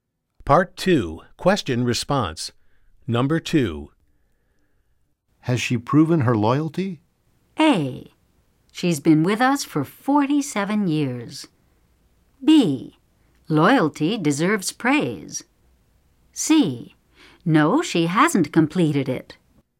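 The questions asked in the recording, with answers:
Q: Has she proven her loyalty?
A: A: She's been with us for 47 years.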